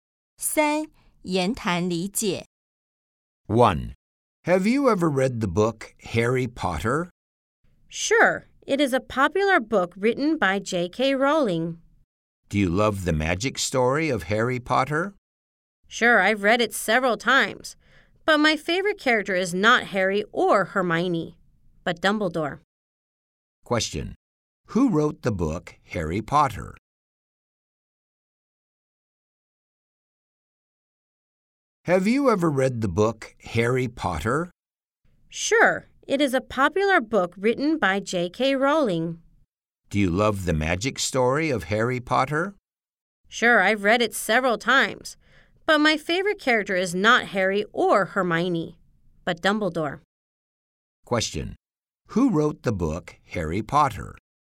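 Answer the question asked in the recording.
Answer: J.K. Rowling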